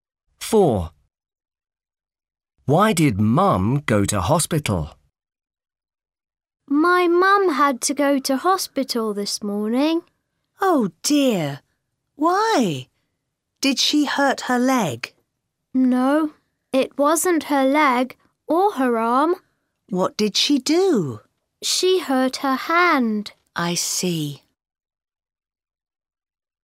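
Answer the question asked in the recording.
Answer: She hurt her hand.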